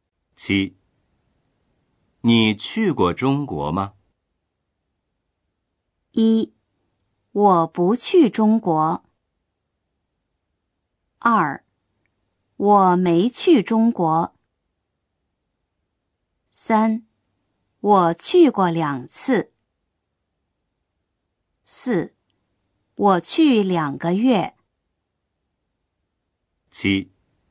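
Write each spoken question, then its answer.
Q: 你去过中国吗?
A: 3: 我去过两次。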